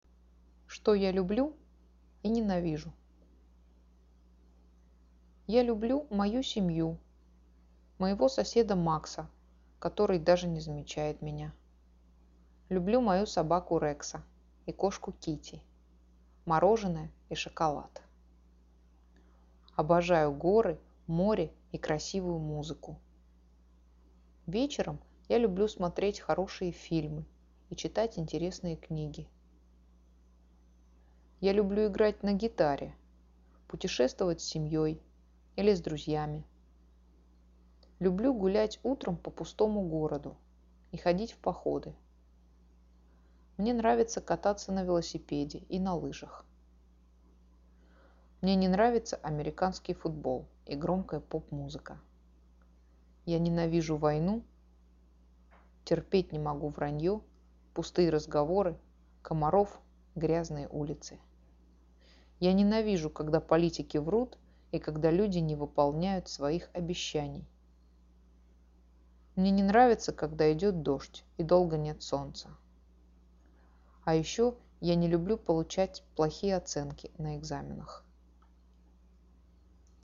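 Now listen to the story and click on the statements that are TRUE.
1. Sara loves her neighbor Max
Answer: True

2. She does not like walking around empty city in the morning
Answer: False

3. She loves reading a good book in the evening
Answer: True

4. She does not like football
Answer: True

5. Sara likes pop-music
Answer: False

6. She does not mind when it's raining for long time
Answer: False

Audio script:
Я люблю мою семью, моего соседа Макса, который даже не замечает меня.
Люблю мою собаку Рекса и кошку Кити, мороженое и шоколад.
Обожаю горы, море и красивую музыку!
Вечером я люблю смотреть хорошие фильмы и читать интересные книги.
Я люблю играть на гитаре, путешествовать с семьёй или с друзьями.
Люблю гулять утром по пустому городу и ходить в походы.
Мне нравится кататься на велосипеде и на лыжах.
Мне не нравится американский футбол и громкая поп-музыка.
Я ненавижу войну.
Терпеть не могу враньё, пустые разговоры, комаров, грязные улицы.
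Я ненавижу, когда политики врут и когда люди не выполняют своих обещаний.
Мне не нравится, когда идёт дождь и долго нет солнца.
А еще я не люблю получать плохие оценки на экзаменах.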